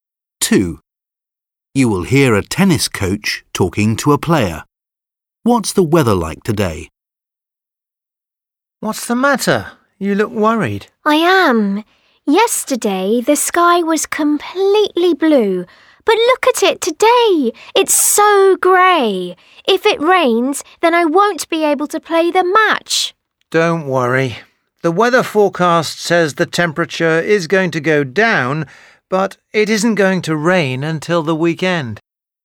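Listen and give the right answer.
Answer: Grey and cloudy, but not raining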